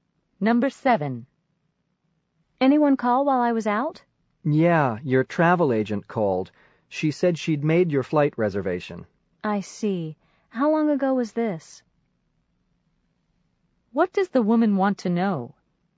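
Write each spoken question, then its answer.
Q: What does the woman want to know?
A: When the travel agent called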